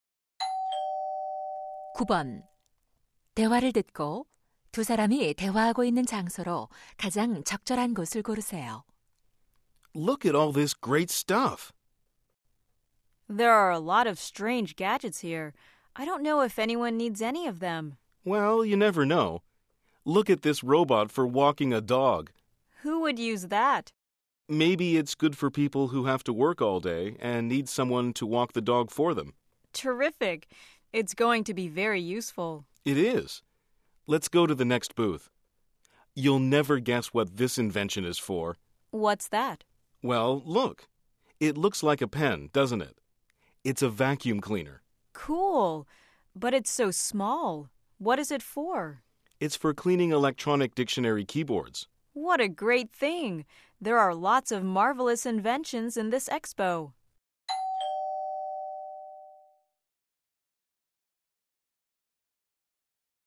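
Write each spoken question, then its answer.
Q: 대화를 듣고 두 사람이 대화하고 있는 장소로 가장 적절한 곳을 고르세요.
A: 발명품 박람회장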